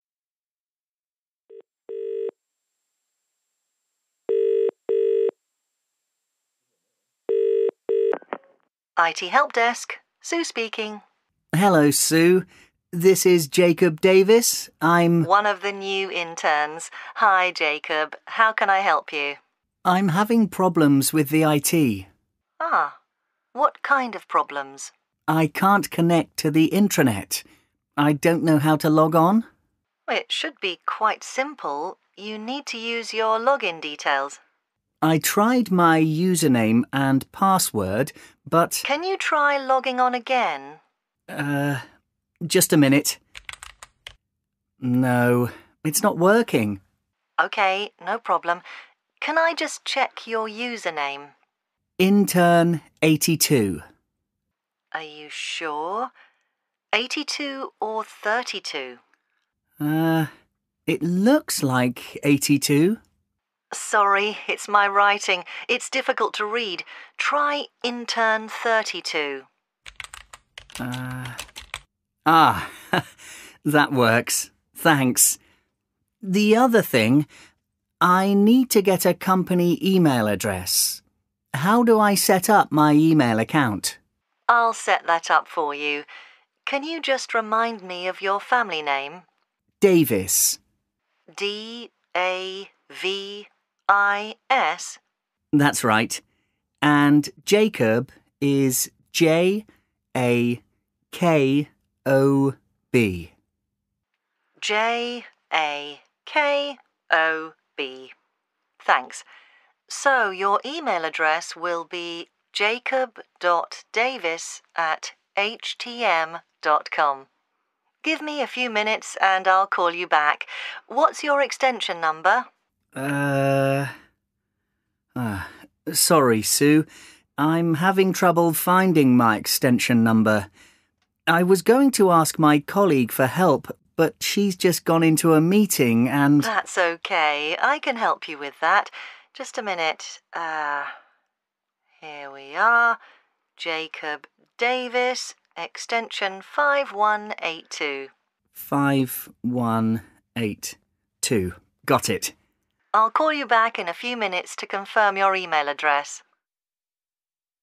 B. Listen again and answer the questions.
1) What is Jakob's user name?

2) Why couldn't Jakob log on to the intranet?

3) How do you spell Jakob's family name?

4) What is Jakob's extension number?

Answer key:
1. intern32
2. He couldn't read Sue's writing and thought his username was Intern82.
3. DAVIS
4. 5182